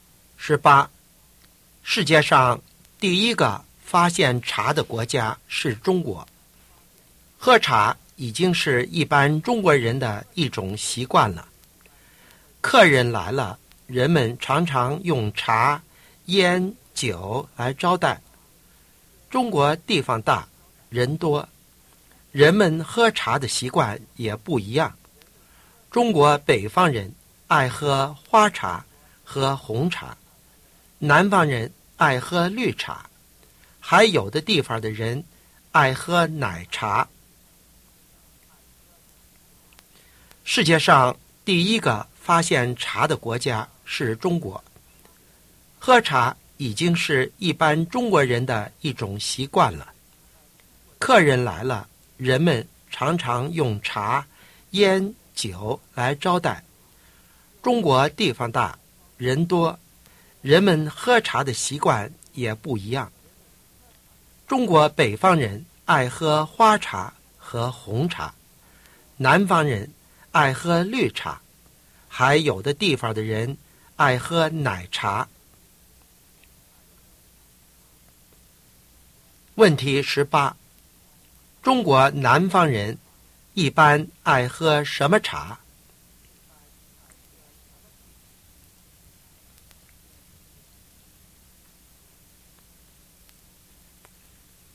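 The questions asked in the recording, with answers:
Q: 中国南方人一般爱喝什么茶?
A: 绿茶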